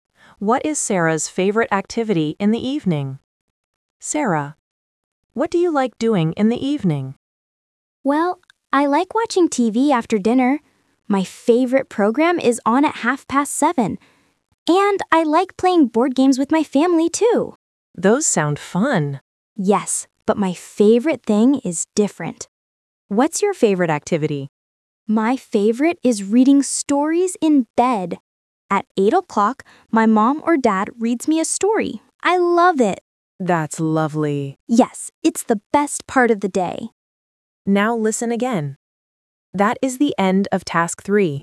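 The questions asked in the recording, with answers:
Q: What is Sarah's favorite activity in the evening?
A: reading stories in bed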